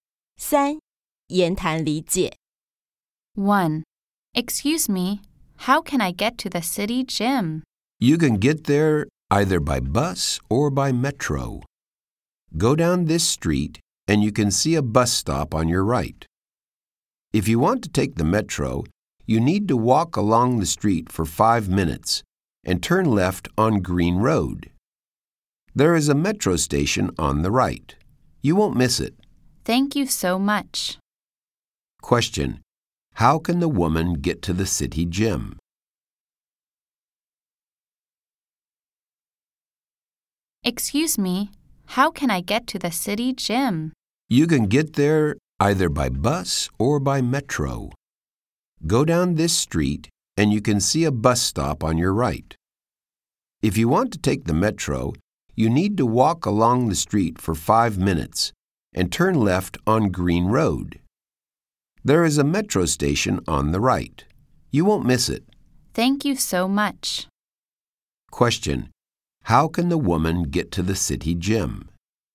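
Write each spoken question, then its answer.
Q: How can the woman get to the city gym?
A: By bus or by metro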